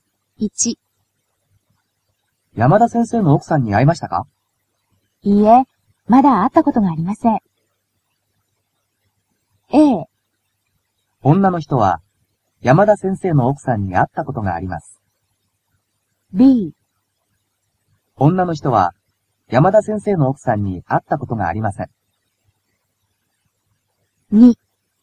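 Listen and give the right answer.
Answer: B: 女の人は山田先生の奥さんに会ったことがありません。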